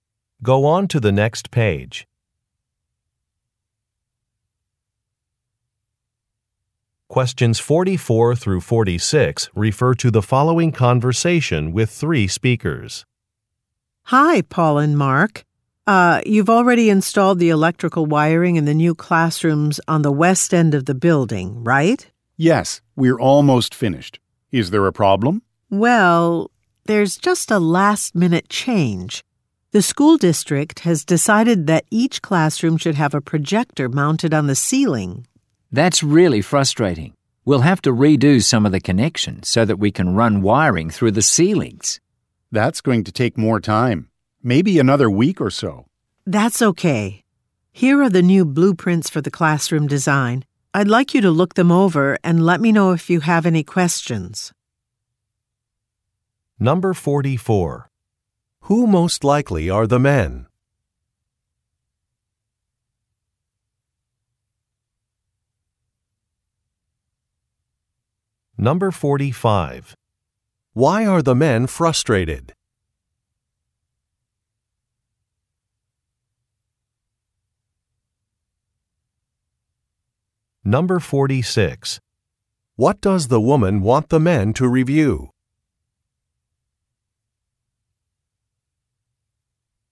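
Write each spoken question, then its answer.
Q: Who most likely are the men?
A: Electricians

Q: Why are the men frustrated?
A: They have to redo some wiring connections because of a last-minute change

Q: What does the woman want the men to review?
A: The new blueprints for the classroom design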